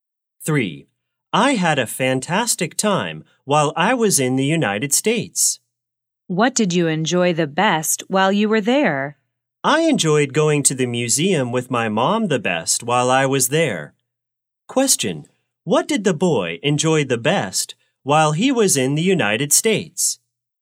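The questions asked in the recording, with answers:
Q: Question, what did the boy enjoy the best while he was in the United States?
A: Going to the museum with his mom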